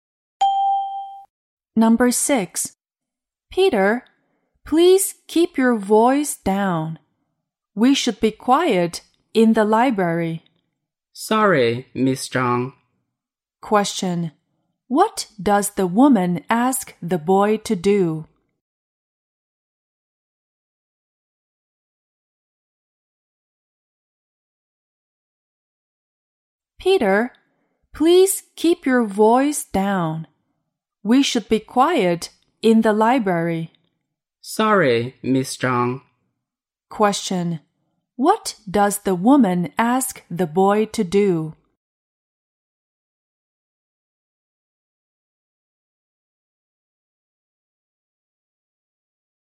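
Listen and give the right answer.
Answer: Keep his voice down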